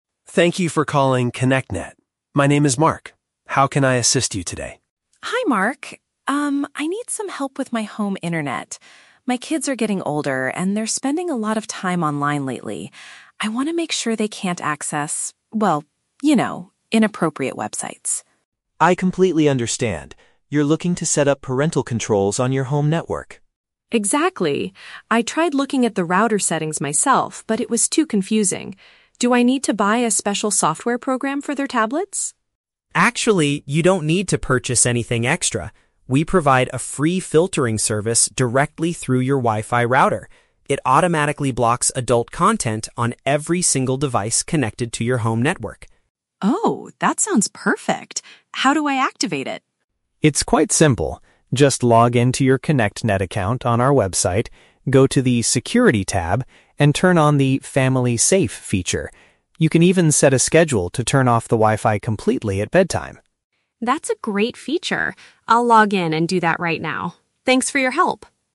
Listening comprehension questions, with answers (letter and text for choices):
Listen to the phone conversation between a parent and an internet service provider (ISP) agent, and choose the correct answer (A, B, or C) for each question.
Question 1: Why is the woman calling the internet provider?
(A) She wants to restrict the type of content her children can see.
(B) She needs to purchase a new Wi-Fi router for her house.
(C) Her home internet connection has been completely cut off.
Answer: (A) She wants to restrict the type of content her children can see.

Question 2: What did the mother initially think she had to do to solve the problem?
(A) Bring the children's tablets to a local computer repair shop.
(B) Pay for an additional application to put on the devices.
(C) Create a brand new account on the company's website.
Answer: (B) Pay for an additional application to put on the devices.

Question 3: According to the agent, what else can the "Family Safe" feature do?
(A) It can track exactly which websites the children visit every day.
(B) It can block inappropriate videos when the kids use mobile data.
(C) It can limit internet access during certain hours of the night.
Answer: (C) It can limit internet access during certain hours of the night.

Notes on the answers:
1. The mother says she wants to make sure her kids "can't access... inappropriate websites." Option A uses the synonym phrase "restrict the type of content" to express this. Why the traps are wrong: Option B is a trap because the word "router" is in the script, but she only looked at the router settings; she does not need to buy a new one. Option C is a plausible reason to call an internet company, but it is never mentioned.
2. The mother asks, "Do I need to buy a special software program for their tablets?" Option B paraphrases this as "Pay for an additional application." Why the traps are wrong: Option C is a trap. The agent does mention her "ConnectNet account on our website," but he tells her to log into her existing account, not create a new one. Plus, this was the agent's solution, not the mother's initial thought. Option A is never mentioned.
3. The agent mentions that she can "set a schedule to turn off the Wi-Fi completely at bedtime." Option C paraphrases this as limiting access "during certain hours of the night." Why the traps are wrong: Option A is a plausible feature of parental controls, but the agent never mentions tracking the children's history. Option B is a trap because the agent specifically says the filter only works on devices "connected to your home network," not on outside mobile networks.

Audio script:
Agent: Thank you for calling ConnectNet. My name is Mark. How can I assist you today?
Mother: Hi Mark. Um, I need some help with my home internet. My kids are getting older, and they're spending a lot of time online lately. I want to make sure they can't access, well, you know, inappropriate websites.
Agent: I completely understand. You're looking to set up parental controls on your home network.
Mother: Exactly. I tried looking at the router settings myself, but it was too confusing. Do I need to buy a special software program for their tablets?
Agent: Actually, you don't need to purchase anything extra. We provide a free filtering service directly through your Wi-Fi router. It automatically blocks adult content on every single device connected to your home network.
Mother: Oh, that sounds perfect. How do I activate it?
Agent: It's quite simple. Just log into your ConnectNet account on our website, go to the "Security" tab, and turn on the "Family Safe" feature. You can even set a schedule to turn off the Wi-Fi completely at bedtime.